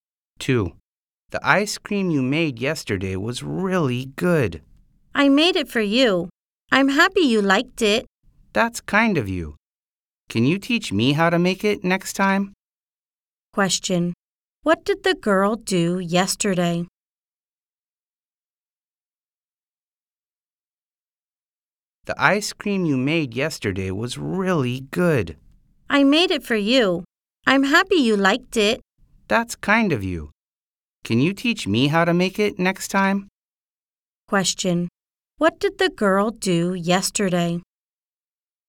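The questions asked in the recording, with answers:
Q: What did the girl do yesterday?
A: She made ice cream.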